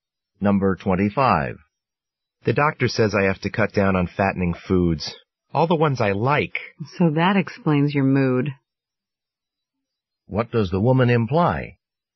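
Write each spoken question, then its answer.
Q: What does the woman imply?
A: The man is in a bad mood because he can't eat his favorite foods.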